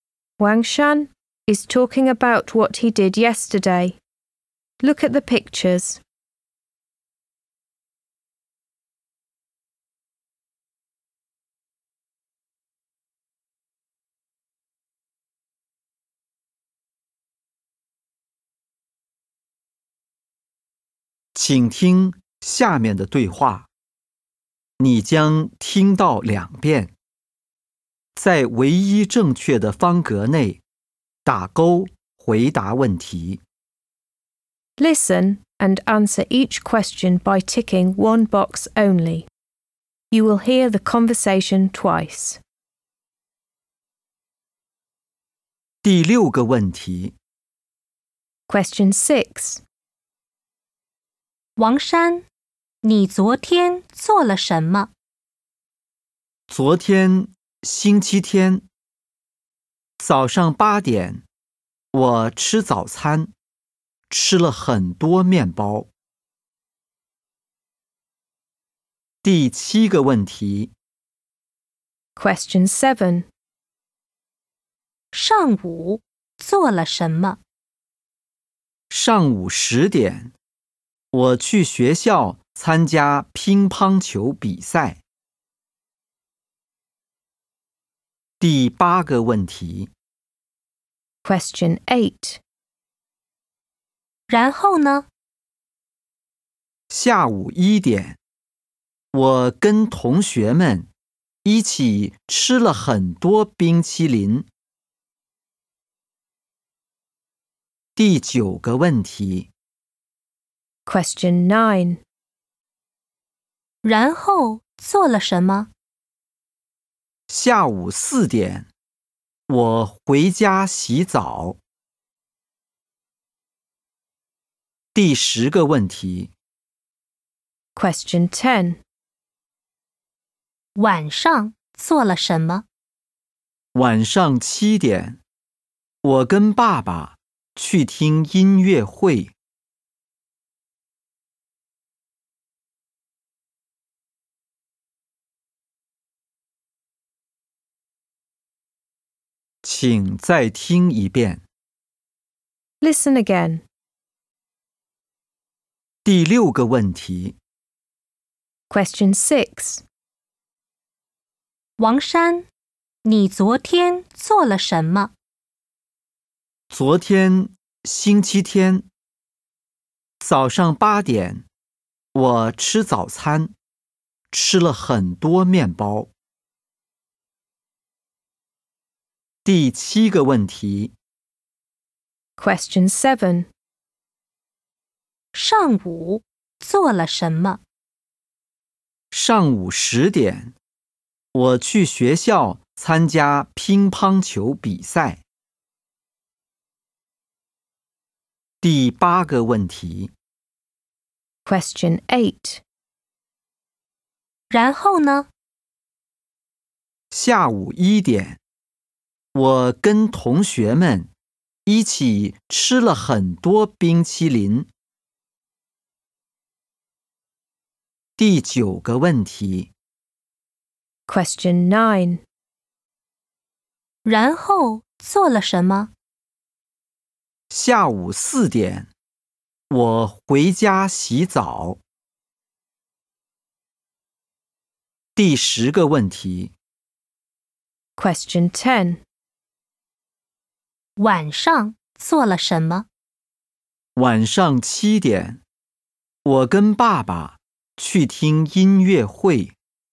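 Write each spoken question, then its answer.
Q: 王山,你昨天做了什么?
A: 吃早餐,吃了很多面包

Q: 上午做了什么?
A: 去学校参加乒乓球比赛

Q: 然后做了什么?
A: 回家洗澡

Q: 晚上做了什么?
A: 跟爸爸去听音乐会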